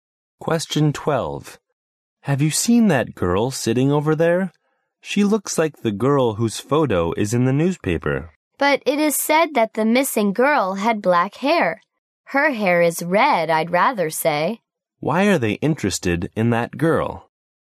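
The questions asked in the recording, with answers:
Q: Why are they interested in that girl?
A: She looks like the missing girl in the newspaper photo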